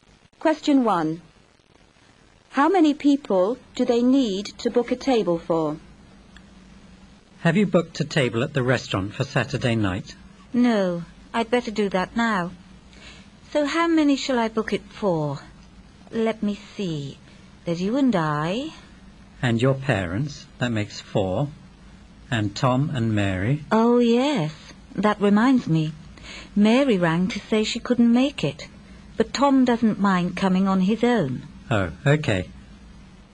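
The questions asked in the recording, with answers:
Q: How many people do they need to book a table for?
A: five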